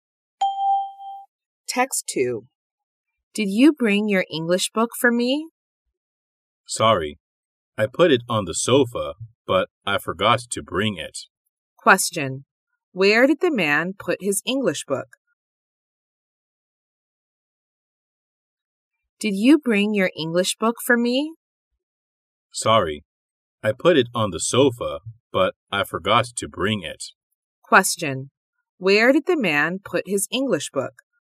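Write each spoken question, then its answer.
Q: Where did the man put his English book?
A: On the sofa.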